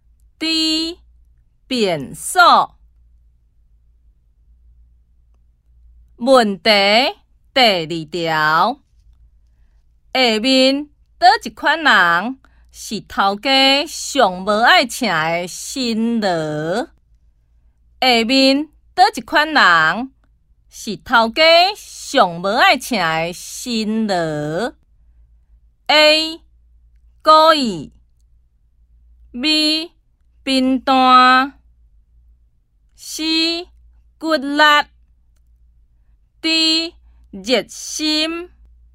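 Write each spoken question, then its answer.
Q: 下面叨一款人是头家上无爱请的新罗?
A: B: 贫惰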